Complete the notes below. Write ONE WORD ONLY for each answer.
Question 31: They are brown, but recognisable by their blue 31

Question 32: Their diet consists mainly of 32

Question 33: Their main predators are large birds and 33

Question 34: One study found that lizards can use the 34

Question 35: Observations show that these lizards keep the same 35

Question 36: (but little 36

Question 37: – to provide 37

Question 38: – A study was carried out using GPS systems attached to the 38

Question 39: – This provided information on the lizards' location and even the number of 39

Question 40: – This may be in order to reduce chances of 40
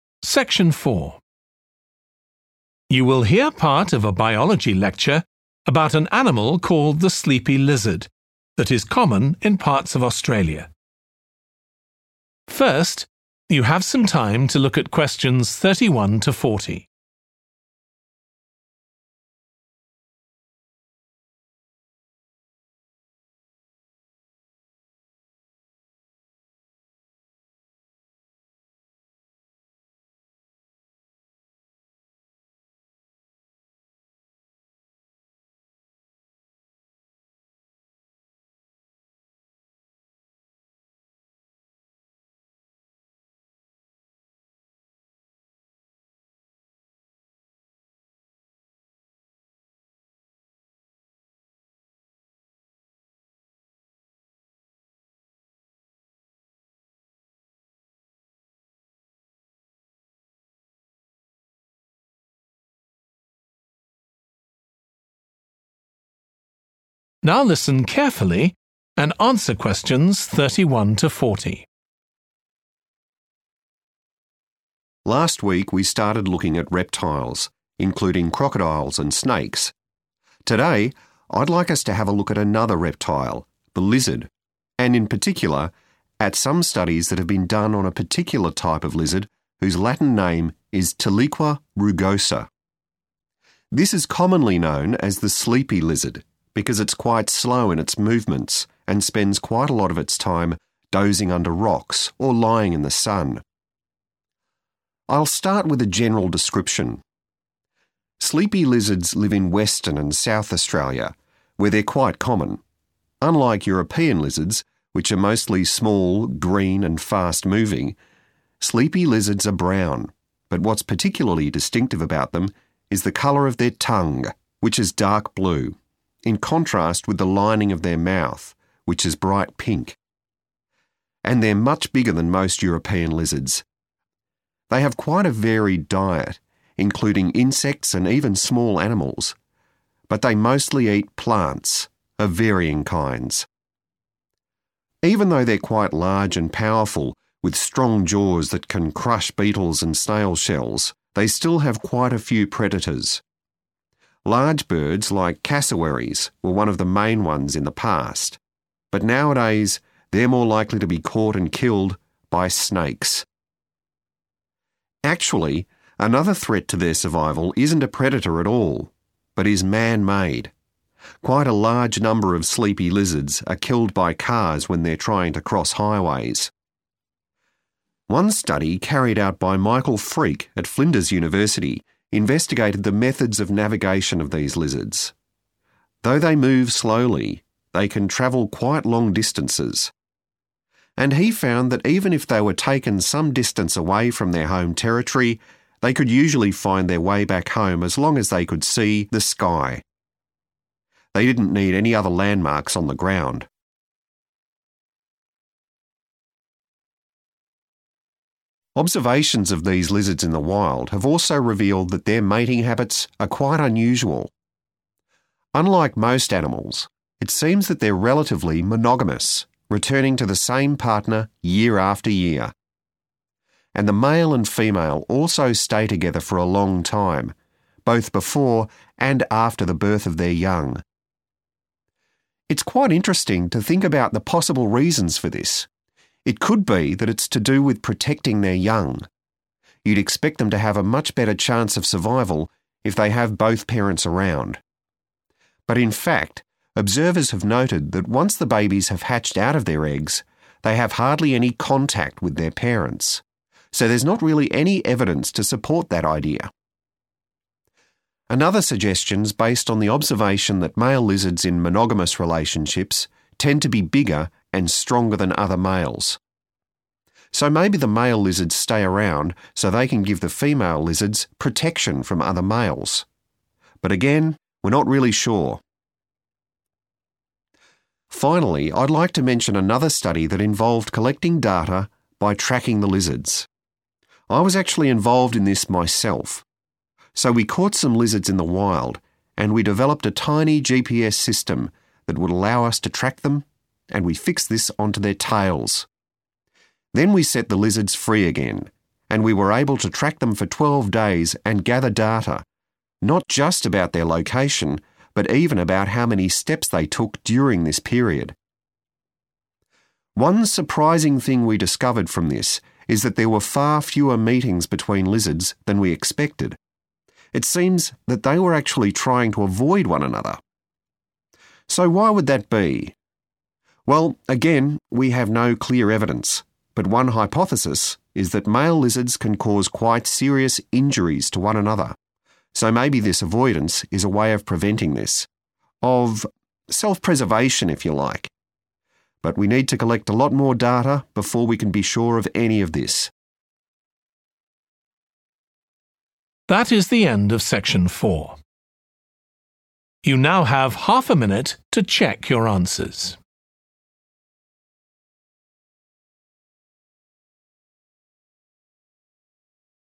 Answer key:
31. tongue / tongues
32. plants
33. snakes
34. sky
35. partner / partners
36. contact
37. protection
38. tail / tails
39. steps
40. injury / injuries

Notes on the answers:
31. The transcript talks about the color of the lizard's tongue, which is dark blue. Answer Explanation: The answer refers to the word 'tongue' and its plural form 'tongues.' Reason For Correctness: The correct answer is 'tongue' because it matches the description of the lizard's tongue being dark blue mentioned in the excerpt. Additionally, 'tongues' is also correct as it refers to multiple tongues, which fits the context of the lizards having more than one tongue.
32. The transcript mentions that the sleepy lizards have a diet that includes insects and small animals, but their main food source is plants of different types. Answer Explanation: The answer 'plants' refers to the main food source of the sleepy lizards. Reason For Correctness: The correct answer is 'plants' because it directly reflects the information from the excerpt where it states that the lizards mostly eat plants. This answer aligns perfectly with the description of the lizard's diet provided in the transcript.
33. The transcript is saying that the lizards are more likely to be caught and killed by snakes. Answer Explanation: The answer is 'snakes,' which are creatures that can harm and eat the lizards. Reason For Correctness: The correct answer is 'snakes' because they are mentioned in the excerpt as the predators that pose a threat to the lizards. Snakes are a danger to the lizards' survival as they can catch and harm them.
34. The transcript says that lizards can find their way back home if they can see the sky. They do not need other things on the ground to help them. Answer Explanation: The answer 'sky' means that the lizards look up at the sky to help them know where to go. Reason For Correctness: The correct answer is 'sky' because the transcript states that lizards use the sky to navigate, highlighting its importance for them to find their way back home.
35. The transcript says that sleepy lizards seem to stay with the same mate every year. Answer Explanation: The answer, "partner", refers to the mate or the other half of a pair. Reason For Correctness: The correct answer "partner" is correct because the excerpt states that the lizards stay with the same mate every year, suggesting a monogamous relationship.
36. The transcript is saying that young lizards don't communicate much or spend time with their parents. Answer Explanation: The answer 'contact' refers to interaction or communication between the young lizards and their parents. Reason For Correctness: The correct answer matches the idea conveyed in the excerpt that there is little interaction or communication ('contact') between the young lizards and their parents, which aligns with the meaning of the word 'contact' as interaction or communication between individuals.
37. The transcript explains that the male lizards can provide protection to the female lizards from other males. Answer Explanation: The answer 'protection' refers to keeping the female lizards safe from harm or danger. Reason For Correctness: The correct answer 'protection' aligns with the information given in the excerpt, where it mentions that male lizards potentially protect female lizards from other males, indicating a form of safeguarding or defense.
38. The transcript talks about a small device called a GPS system that was attached to the tails of the lizards for tracking purposes. Answer Explanation: The answer 'tail' refers to the part of the lizards' body where the GPS systems were attached. Reason For Correctness: The correct answer is 'tail' because it matches the body part mentioned in the excerpt, which is where the GPS systems were attached for tracking the lizards.
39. The transcript says that even though researchers know where the lizards go, they also want to know how many steps the lizards took while moving around. Answer Explanation: The answer "steps" means the number of times the lizards moved their feet while walking. Reason For Correctness: The correct answer "steps" is right because the excerpt says the study looked at the "number of steps" taken by the lizards, which means how many times they moved their feet while walking.
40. The transcript suggests that male lizards can cause severe harm to each other. To avoid this harm, the lizards may be trying to stay away from each other. Answer Explanation: The answer 'injury/injuries' refers to harm or damage caused to the lizards, possibly by their own kind. Reason For Correctness: The correct answer matches the concept in the excerpt where it implies that injury or harm might occur due to interactions between male lizards. This aligns with the need for avoidance behavior observed in the lizards to prevent such injuries.

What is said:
Last week, we started looking at reptiles, including crocodiles and snakes. Today, I'd like us to have a look at another reptile – the lizard – and in particular, at some studies that have been done on a particular type of lizard whose Latin name is tiliqua rugosa. This is commonly known as the sleepy lizard, because it's quite slow in its movements and spends quite a lot of its time dozing under rocks or lying in the sun.
I'll start with a general description. Sleepy lizards live in Western and South Australia, where they're quite common. Unlike European lizards, which are mostly small, green and fast-moving, sleepy lizards are brown, but what's particularly distinctive about them is the colour of their tongue, which is dark blue, in contrast with the lining of their mouth which is bright pink. And they're much bigger than most European lizards. They have quite a varied diet, including insects and even small animals, but they mostly eat plants of varying kinds.
Even though they're quite large and powerful, with strong jaws that can crush beetles and snail shells, they still have quite a few predators. Large birds like cassowaries were one of the main ones in the past, but nowadays they're more likely to be caught and killed by snakes. Actually, another threat to their survival isn't a predator at all, but is man-made – quite a large number of sleepy lizards are killed by cars when they're trying to cross highways.
One study carried out by Michael Freake at Flinders University investigated the methods of navigation of these lizards. Though they move slowly, they can travel quite long distances. And he found that even if they were taken some distance away from their home territory, they could usually find their way back home as long as they could see the sky – they didn't need any other landmarks on the ground.
Observations of these lizards in the wild have also revealed that their mating habits are quite unusual. Unlike most animals, it seems that they're relatively monogamous, returning to the same partner year after year. And the male and female also stay together for a long time, both before and after the birth of their young.
It's quite interesting to think about the possible reasons for this. It could be that it's to do with protecting their young – you'd expect them to have a much better chance of survival if they have both parents around. But in fact observers have noted that once the babies have hatched out of their eggs, they have hardly any contact with their parents. So, there's not really any evidence to support that idea.
Another suggestion's based on the observation that male lizards in monogamous relationships tend to be bigger and stronger than other males. So maybe the male lizards stay around so they can give the female lizards protection from other males. But again, we're not really sure.
Finally, I'd like to mention another study that involved collecting data by tracking the lizards. I was actually involved in this myself. So we caught some lizards in the wild and we developed a tiny GPS system that would allow us to track them, and we fixed this onto their tails. Then we set the lizards free again, and we were able to track them for twelve days and gather data, not just about their location, but even about how many steps they took during this period.
One surprising thing we discovered from this is that there were far fewer meetings between lizards than we expected – it seems that they were actually trying to avoid one another. So why would that be? Well, again we have no clear evidence, but one hypothesis is that male lizards can cause quite serious injuries to one another, so maybe this avoidance is a way of preventing this – of self-preservation, if you like. But we need to collect a lot more data before we can be sure of any of this.